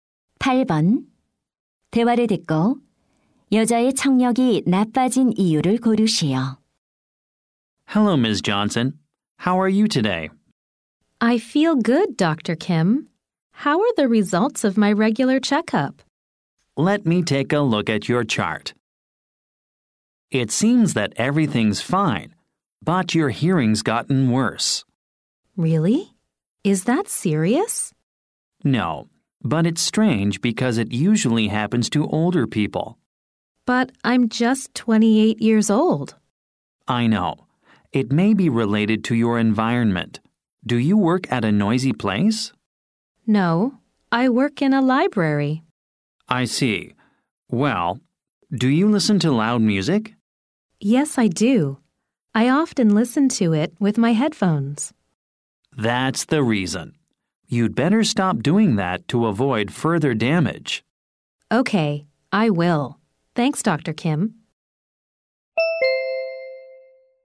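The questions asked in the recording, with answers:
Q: 대화를 듣고 여자의 청력이 나빠진 이유를 고르시오.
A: 헤드폰으로 시끄러운 음악을 자주 들어서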